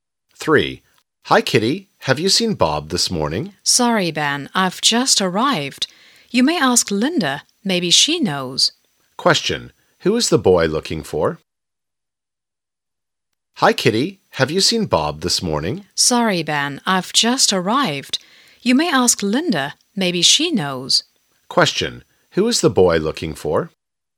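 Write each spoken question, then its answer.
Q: Who is the boy looking for?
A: Bob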